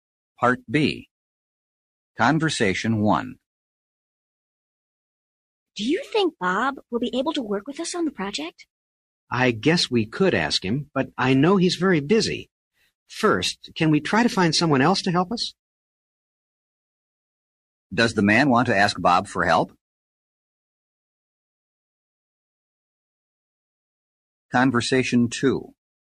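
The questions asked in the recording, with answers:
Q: Does the man want to ask Bob for help?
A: No, he'd first like to find someone else.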